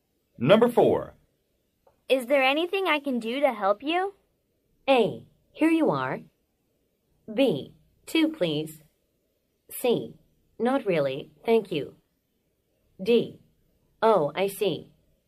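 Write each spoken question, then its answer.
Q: Is there anything I can do to help you?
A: C: Not really, thank you.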